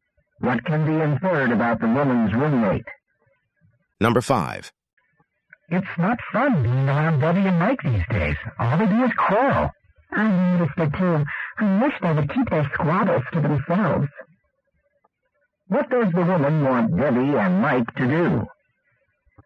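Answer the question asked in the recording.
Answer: Keep their arguments private.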